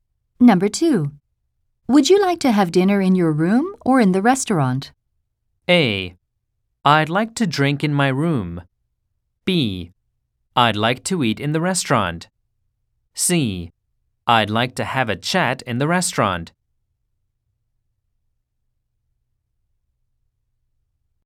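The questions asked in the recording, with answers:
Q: Would you like to have dinner in your room or in the restaurant?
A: B: I'd like to eat in the restaurant.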